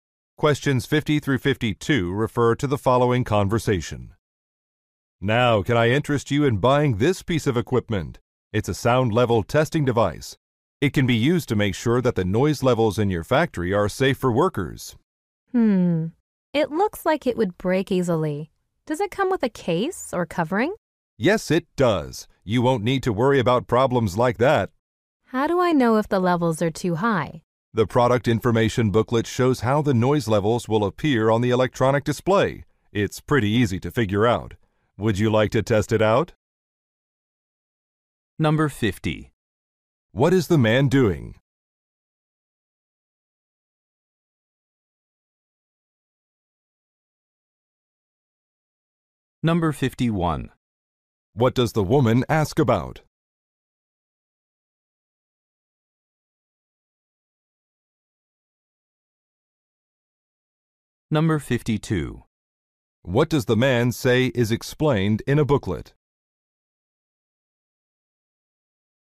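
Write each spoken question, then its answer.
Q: What is the man doing?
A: Selling a sound level testing device

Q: What does the woman ask about?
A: Whether it comes with a case

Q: What does the man say is explained in a booklet?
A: How noise levels appear on the display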